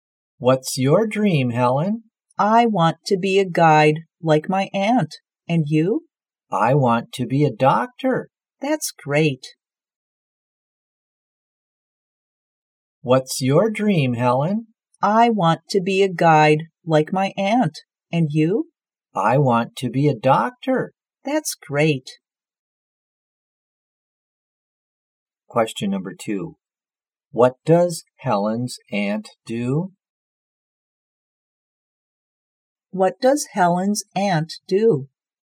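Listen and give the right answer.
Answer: She is a guide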